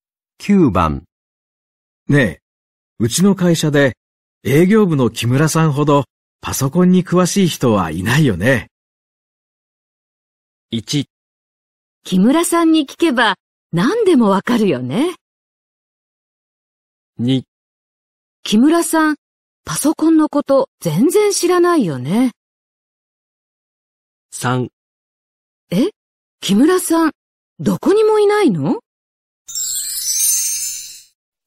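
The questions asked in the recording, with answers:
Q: ねえ、うちの会社で営業部の木村さんほどパソコンに詳しい人はいないよね。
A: 1: 木村さんに聞けば何でもわかるよね。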